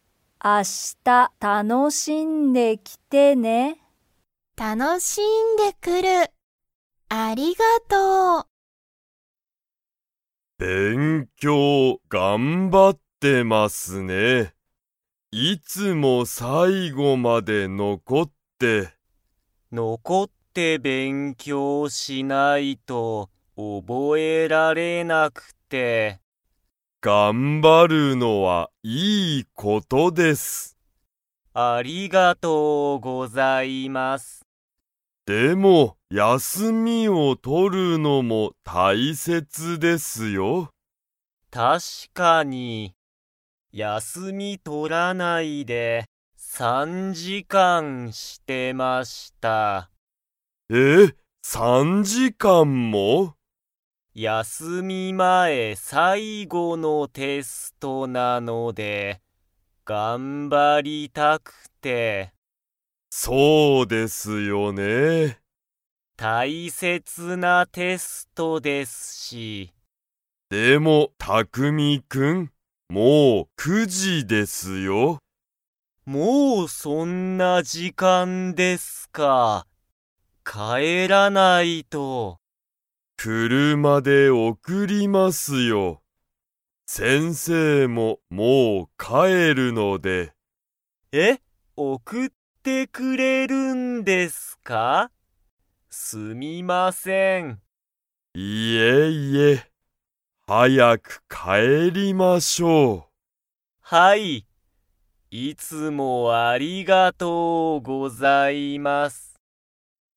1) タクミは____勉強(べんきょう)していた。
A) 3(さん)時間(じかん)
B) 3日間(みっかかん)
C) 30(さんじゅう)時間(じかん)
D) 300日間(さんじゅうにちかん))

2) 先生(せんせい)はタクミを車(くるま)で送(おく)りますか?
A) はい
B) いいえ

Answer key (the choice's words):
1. 3(さん)時間(じかん)
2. はい